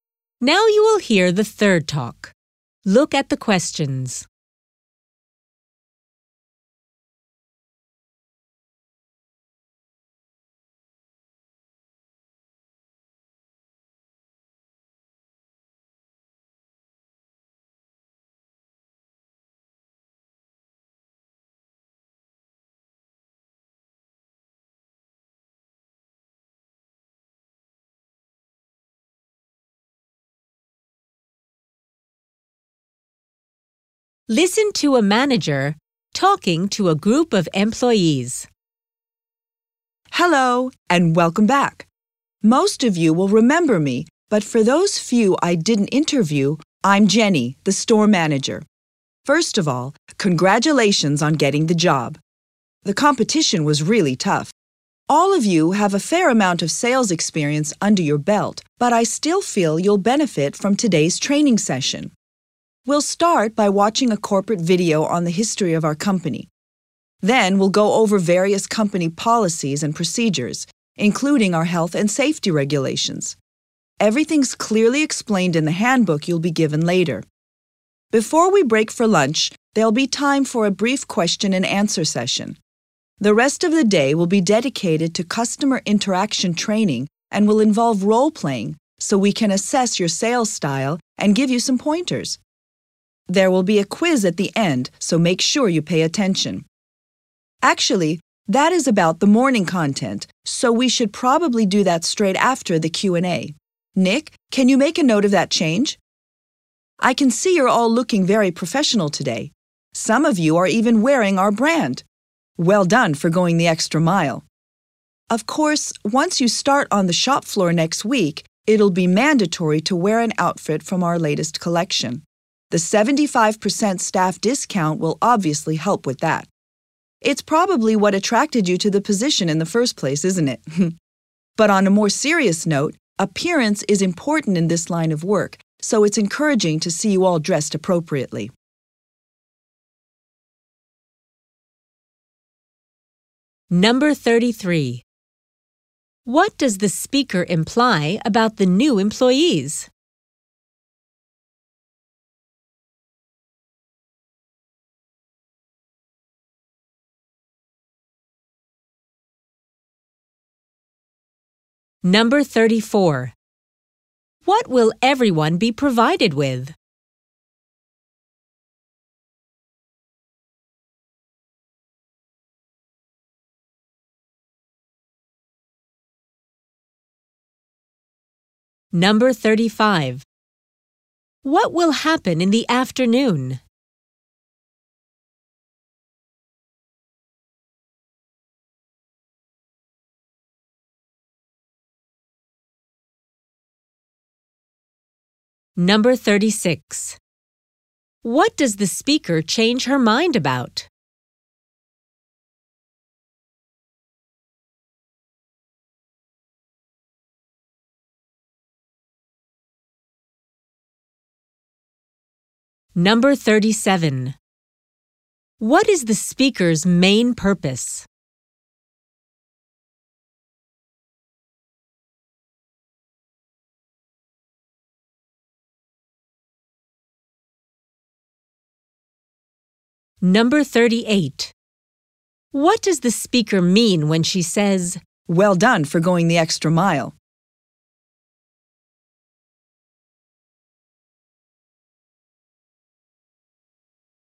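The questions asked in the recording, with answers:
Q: What will everyone be provided with?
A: A handbook

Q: What will happen in the afternoon?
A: Customer interaction training with role-playing

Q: What does the speaker change her mind about?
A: When the quiz will take place

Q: What is the speaker's main purpose?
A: To explain the plan for the new staff's training day

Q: What does the speaker mean when she says,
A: She appreciates that some of them are already wearing the store's brand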